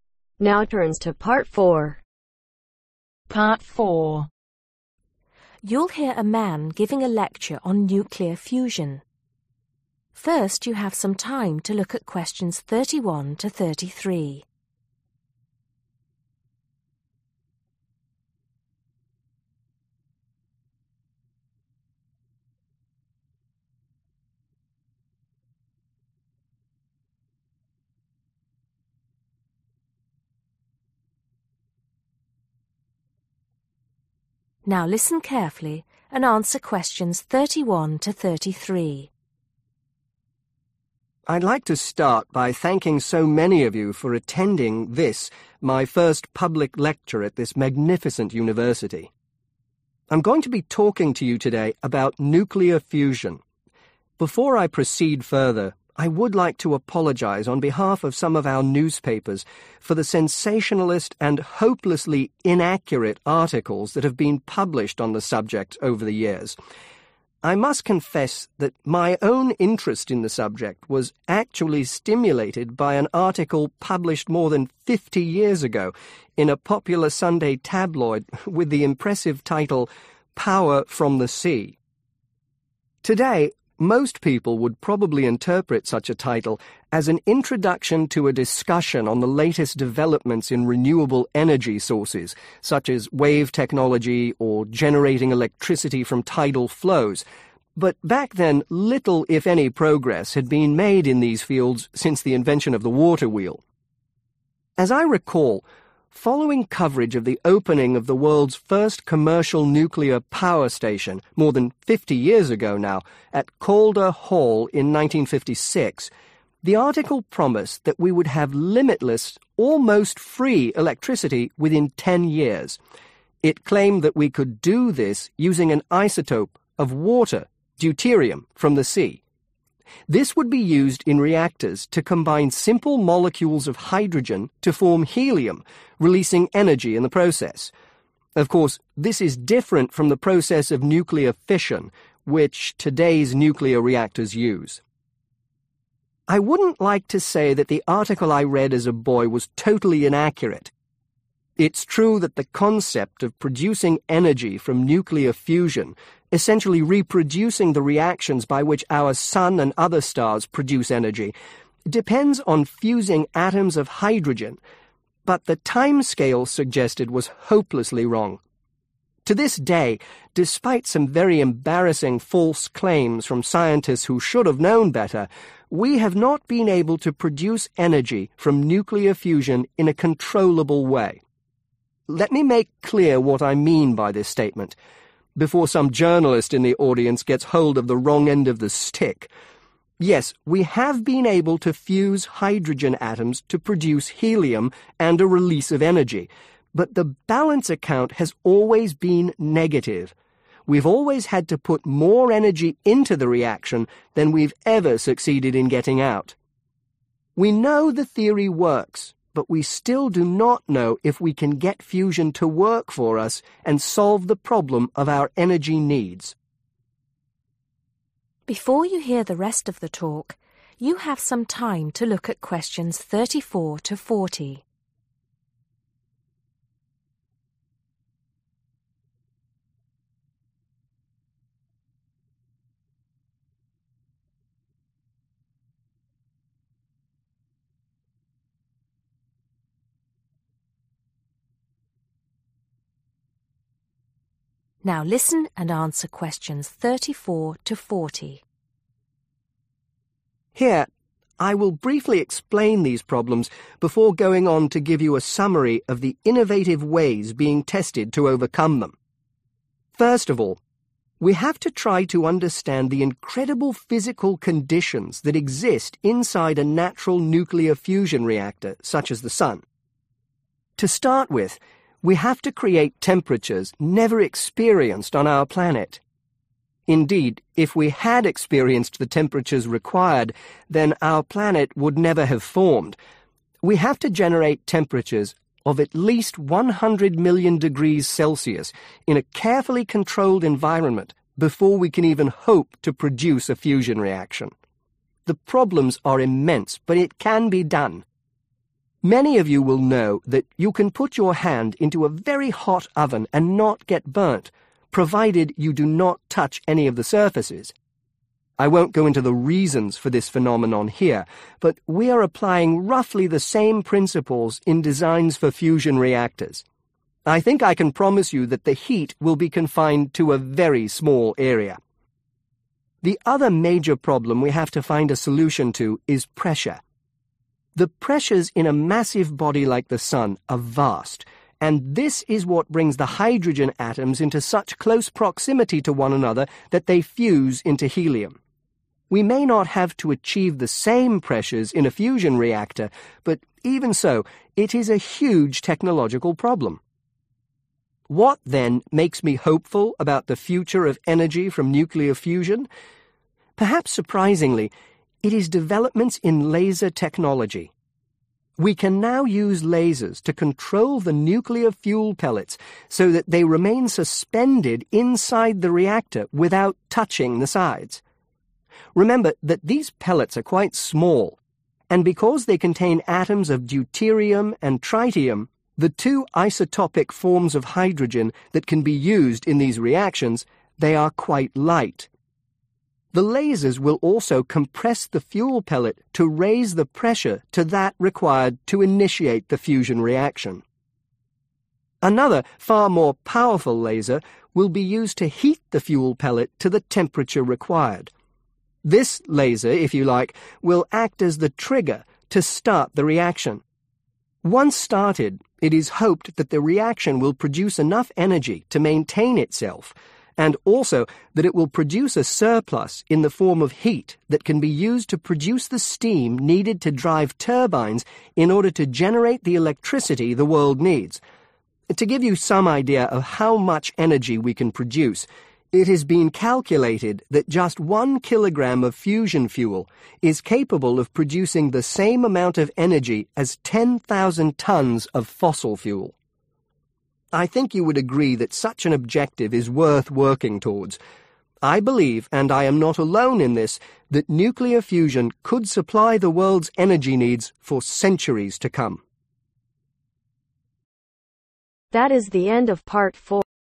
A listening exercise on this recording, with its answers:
Choose the correct letter A , B or C.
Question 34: Temperatures of at least 100 ............ degrees are needed for fusion to take place.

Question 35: Creating the pressure required in a ............ reactor is a major technological problem.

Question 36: A number of (36)............ will suspend the (37)............ reaction.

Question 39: Extra energy released in this process will be used to produce (39)............ that can be used to generate electricity.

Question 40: It is believed that the amount of energy that can be produced from (40)............ kilogram of fusion fuel is equivalent to that which can be produced from 10,000 tones of fossil fuel.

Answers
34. Million
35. Fusion
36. Lasers
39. Steam
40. 1/One